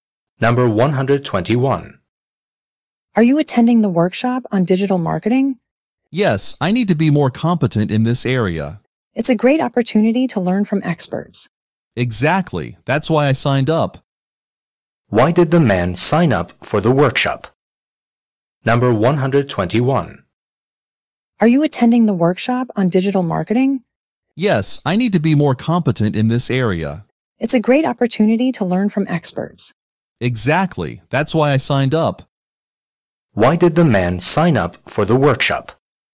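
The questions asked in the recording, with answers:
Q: Why did the man sign up for the workshop?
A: To become more competent in digital marketing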